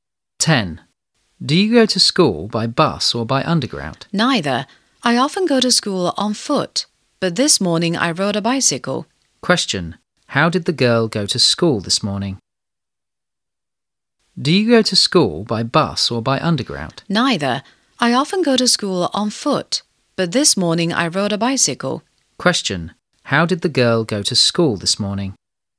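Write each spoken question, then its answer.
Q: How did the girl go to school this morning?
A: By bicycle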